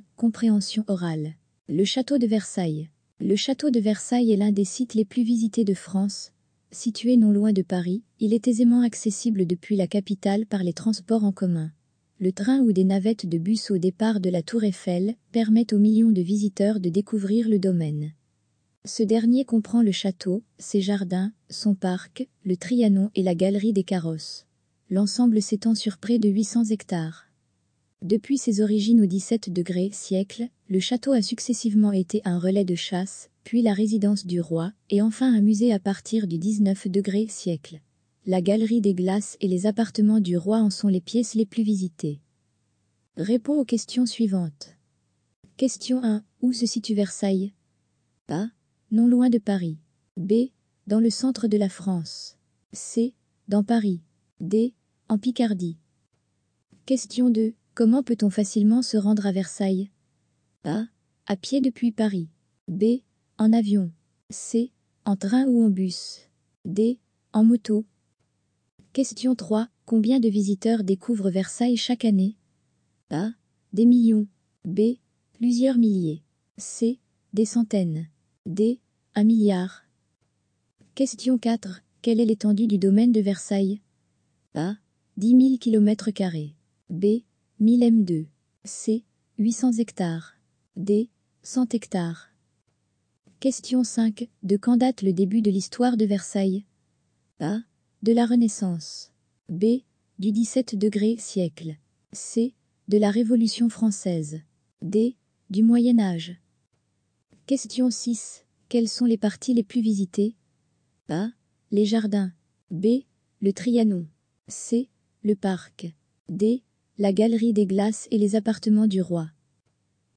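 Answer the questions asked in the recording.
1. A: Non loin de Paris.
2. C: En train ou en bus.
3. A: Des millions.
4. C: 800 hectares.
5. B: Du XVIIe siècle.
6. D: La galerie des glaces et les appartements du roi.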